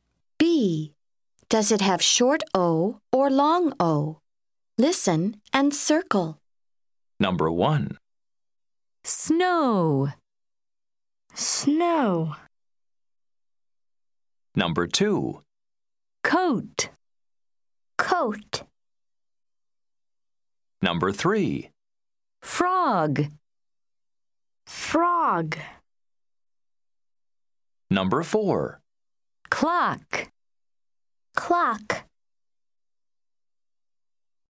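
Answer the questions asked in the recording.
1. long O (snow)
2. long O (coat)
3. short O (frog)
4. short O (clock)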